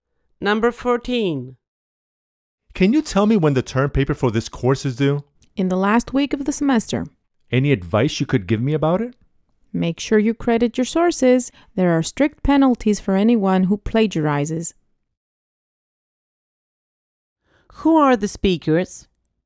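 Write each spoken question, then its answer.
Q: Who are the speakers?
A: A student and a professor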